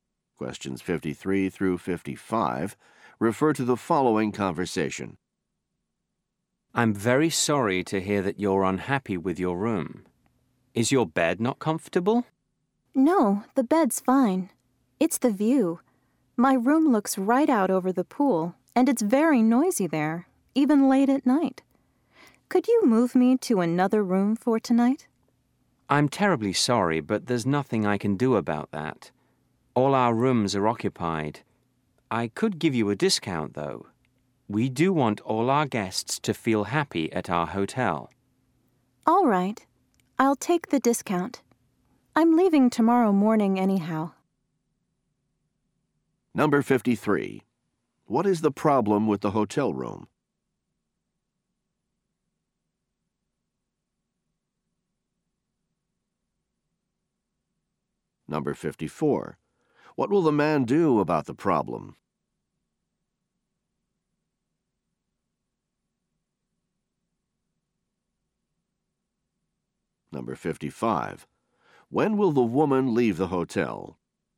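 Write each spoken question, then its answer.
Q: What is the problem with the hotel room?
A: It is noisy

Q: What will the man do about the problem?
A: Give her a discount

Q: When will the woman leave the hotel?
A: Tomorrow morning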